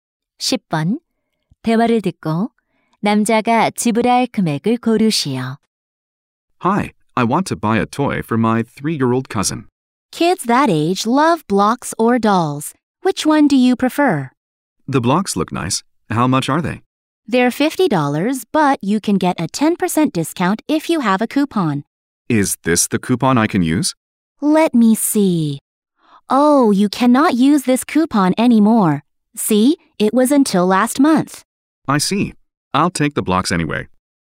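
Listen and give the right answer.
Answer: $50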